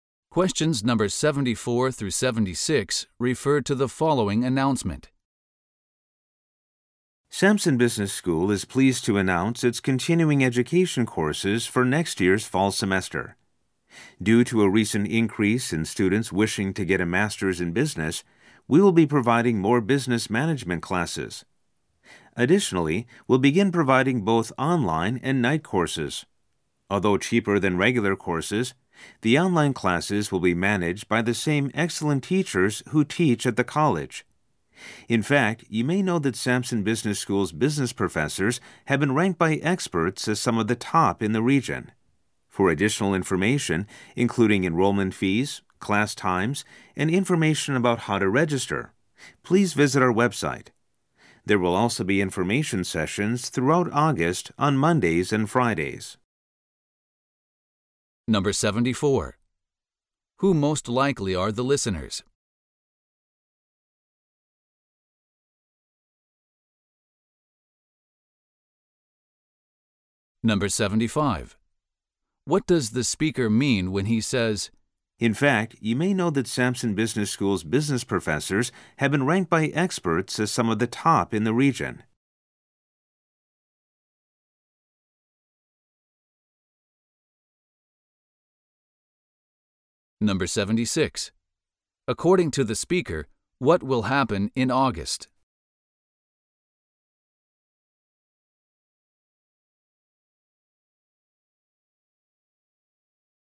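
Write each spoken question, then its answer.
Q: According to the speaker, what will happen in August?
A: Information sessions will be held on Mondays and Fridays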